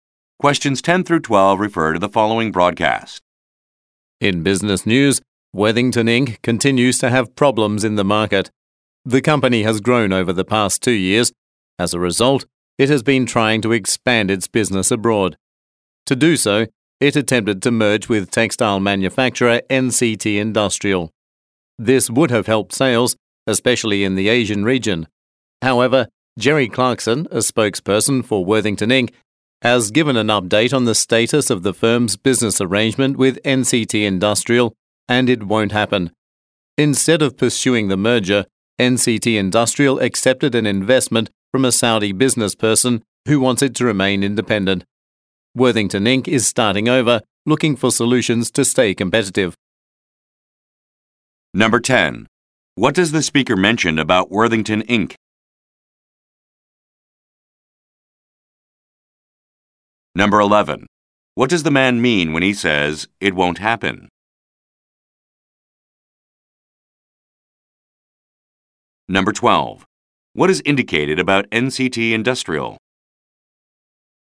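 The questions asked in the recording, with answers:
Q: What does the man mean when he says, "It won't happen"?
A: The merger with NCT Industrial will not take place.

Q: What is indicated about NCT Industrial?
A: It accepted an investment from a Saudi businessperson and will remain independent.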